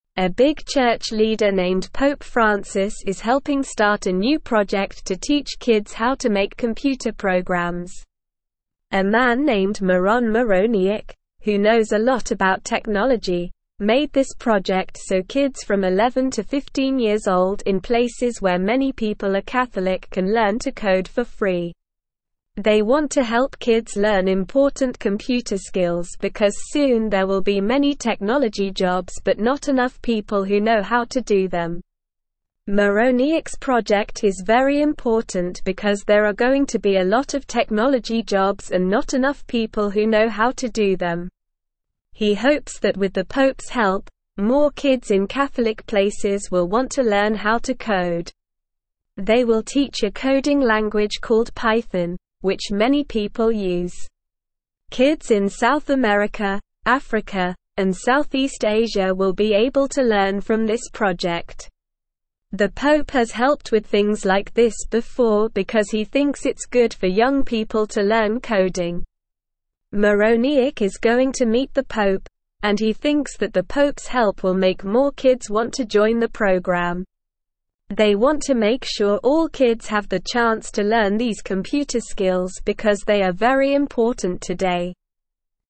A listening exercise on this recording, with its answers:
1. A big (1)______ leader named Pope Francis is helping start a new project to teach kids how to make computer programs.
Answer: church

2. in places where many (2)______ are Catholic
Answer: people

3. can learn to (3)______ for free.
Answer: code

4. soon there will be (4)______ (5)______ jobs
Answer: many

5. soon there will be (4)______ (5)______ jobs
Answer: technology

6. there are (6)______ to be a lot of technology jobs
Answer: going

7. more (7)______ in Catholic places will want to learn how to code.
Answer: kids

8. (8)______ in South America, Africa, and Southeast Asia will be (9)______ to learn from this project.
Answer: Kids

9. (8)______ in South America, Africa, and Southeast Asia will be (9)______ to learn from this project.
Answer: able

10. the Pope's help will make (10)______ kids want to join the (11)______.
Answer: more

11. the Pope's help will make (10)______ kids want to join the (11)______.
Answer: program

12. because they are very important (12)______.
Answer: today

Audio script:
A big church leader named Pope Francis is helping start a new project to teach kids how to make computer programs. A man named Miron Mironiuk, who knows a lot about technology, made this project so kids from 11 to 15 years old in places where many people are Catholic can learn to code for free. They want to help kids learn important computer skills because soon there will be many technology jobs but not enough people who know how to do them.
Mironiuk's project is very important because there are going to be a lot of technology jobs and not enough people who know how to do them. He hopes that with the Pope's help, more kids in Catholic places will want to learn how to code. They will teach a coding language called Python, which many people use. Kids in South America, Africa, and Southeast Asia will be able to learn from this project.
The Pope has helped with things like this before because he thinks it's good for young people to learn coding. Mironiuk is going to meet the Pope, and he thinks that the Pope's help will make more kids want to join the program. They want to make sure all kids have the chance to learn these computer skills because they are very important today.

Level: Level 2